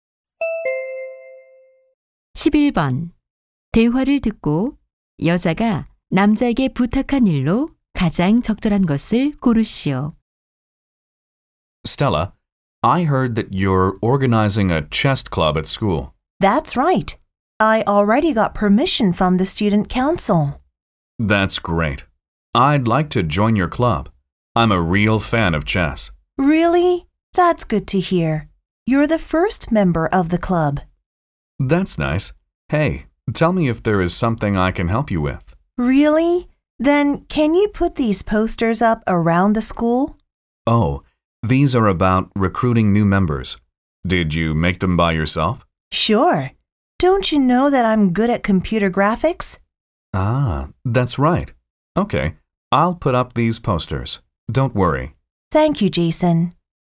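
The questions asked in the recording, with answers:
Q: 대화를 듣고 여자가 남자에게 부탁한 일로 가장 적절한 것을 고르시오.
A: 학교 곳곳에 포스터 붙이기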